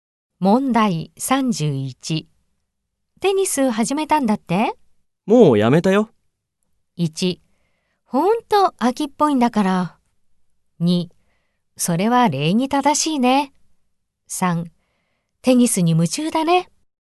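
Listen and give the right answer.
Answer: 1: ほんと飽きっぽいんだから。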